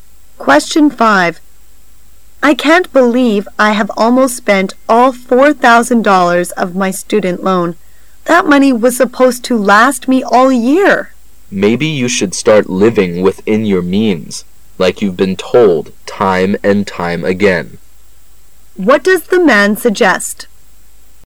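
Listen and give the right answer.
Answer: She should live within her means and spend less.

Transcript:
[解析] W:I can't believe I have almost spent all $4,000 of my student loan:.That money was supposed to last me all year. M:Maybe you should start living within your means, like you've been told time and time again. W:What does the man suggest?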